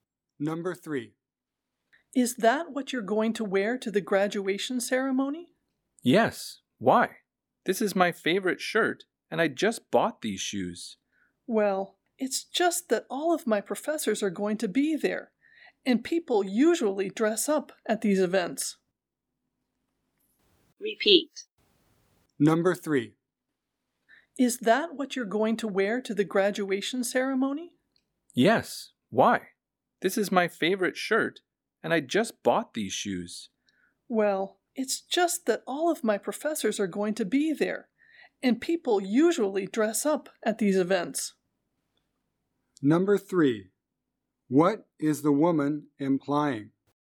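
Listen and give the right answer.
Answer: The man's clothes are too casual for the graduation ceremony, so he should dress up.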